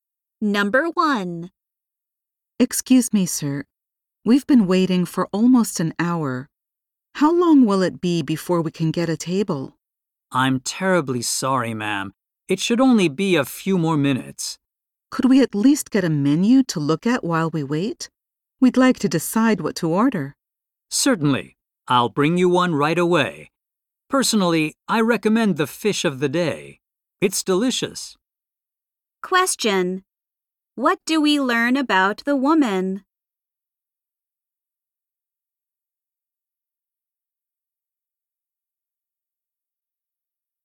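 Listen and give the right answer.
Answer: She has been waiting almost an hour for a table.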